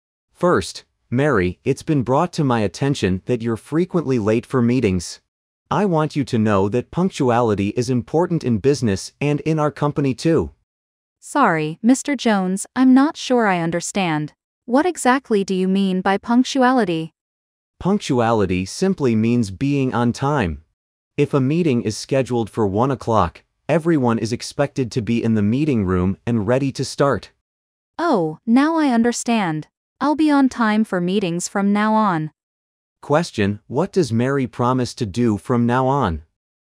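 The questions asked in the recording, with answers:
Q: What does Mary promise to do from now on?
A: Be on time for meetings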